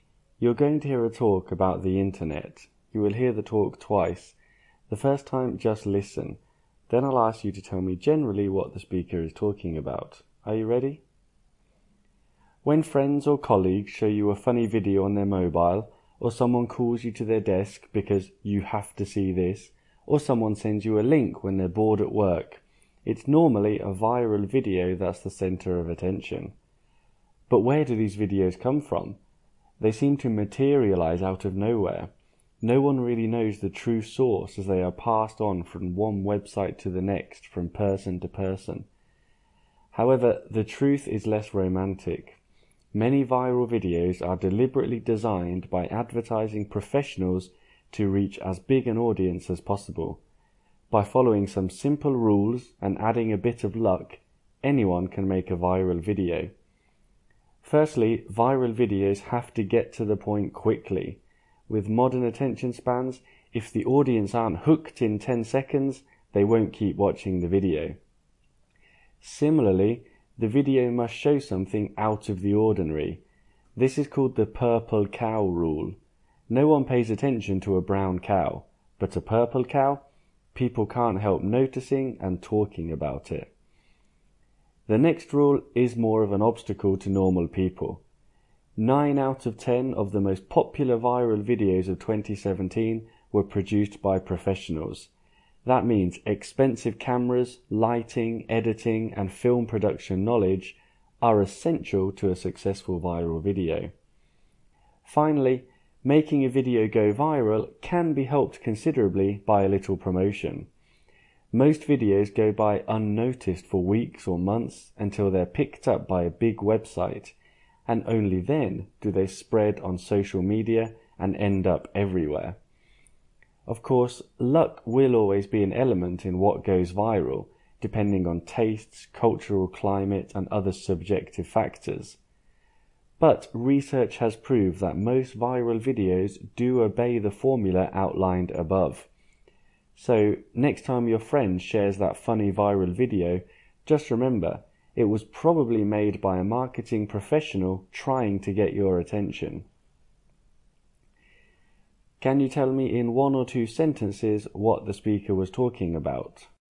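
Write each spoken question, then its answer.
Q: Can you tell me in one or two sentences what the speaker was talking about?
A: How viral videos are made: most are designed by advertising professionals following simple rules.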